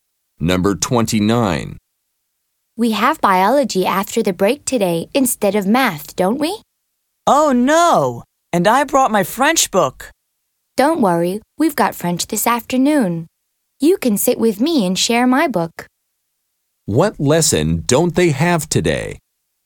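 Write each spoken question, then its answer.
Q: What lesson don't they have today?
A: Math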